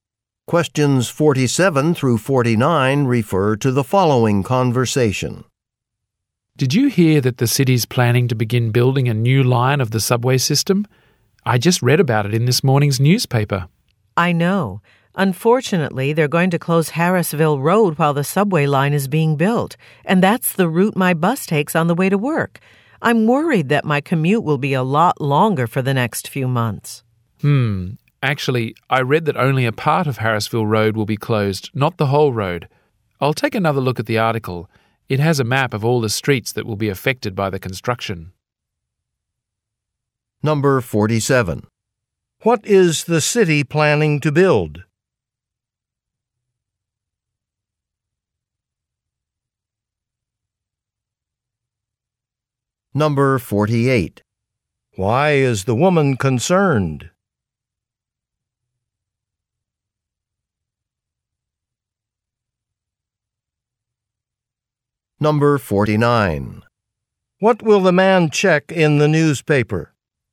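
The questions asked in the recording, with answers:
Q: What is the city planning to build?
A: A new subway line

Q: Why is the woman concerned?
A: Her commute will be longer because her bus route will be closed

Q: What will the man check in the newspaper?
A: A map of the streets affected by the construction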